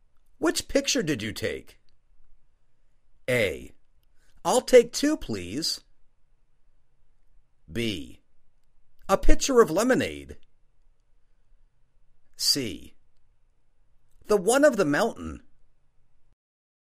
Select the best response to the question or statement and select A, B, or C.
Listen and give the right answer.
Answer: The one of the mountain.